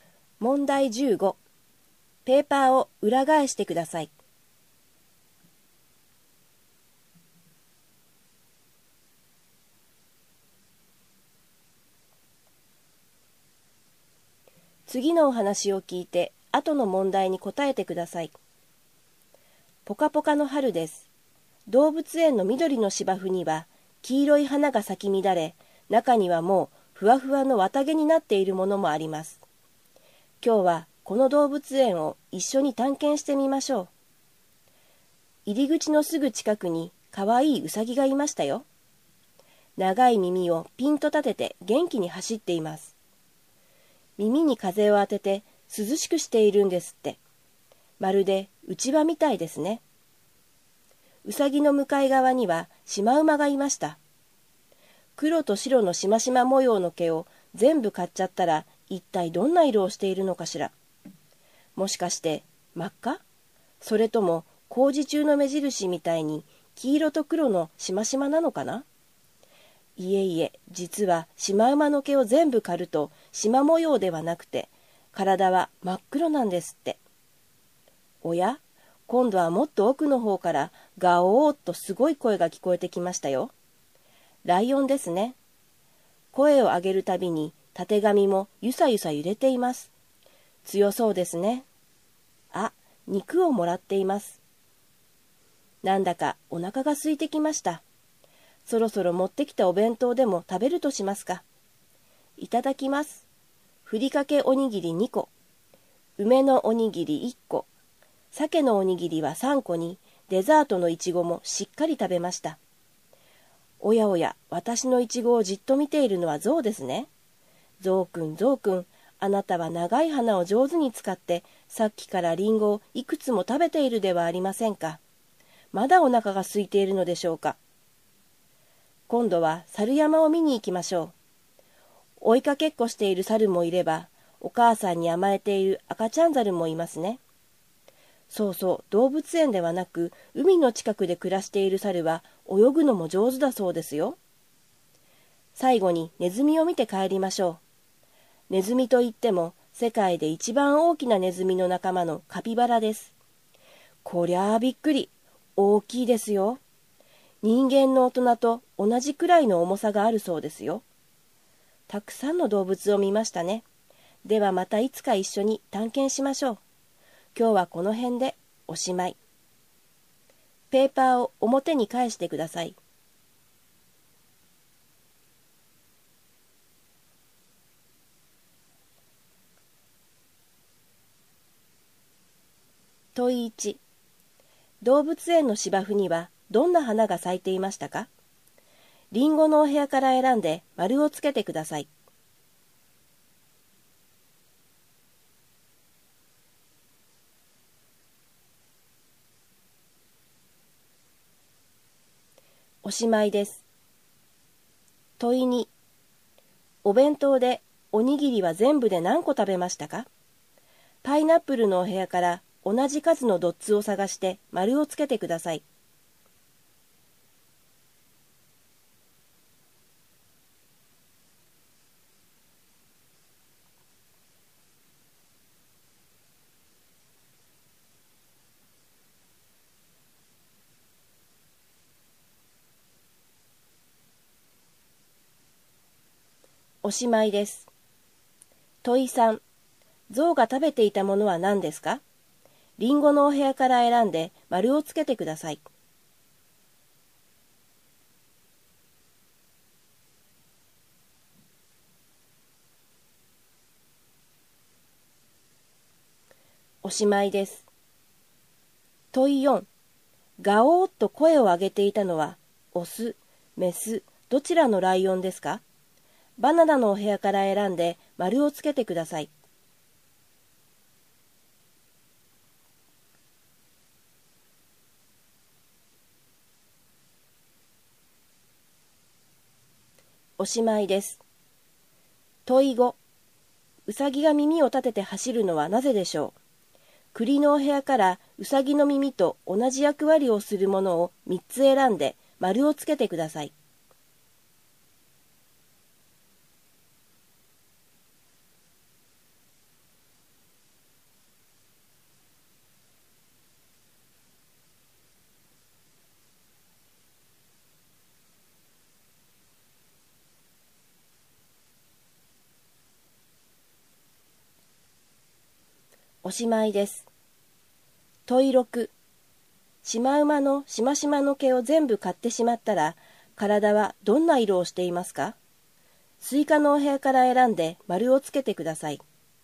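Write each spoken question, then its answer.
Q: 動物園の芝生にはどんな花が咲いていましたか?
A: 黄色い花(綿毛になるもの)

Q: お弁当でおにぎりは全部で何個食べましたか?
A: 6個

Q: 象が食べていたものは何ですか?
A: リンゴ

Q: ガオーッと声を上げていたのはオス、メス、どちらのライオンですか?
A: オス(たてがみがある)

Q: シマウマのしましまの毛を全部買ってしまったら、体はどんな色をしていますか?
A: 真っ黒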